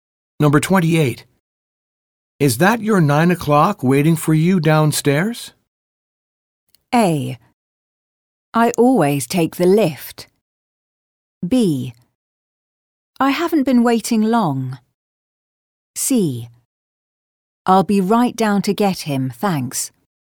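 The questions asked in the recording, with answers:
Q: Is that your 9 o'clock waiting for you downstairs?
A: C: I'll be right down to get him, thanks.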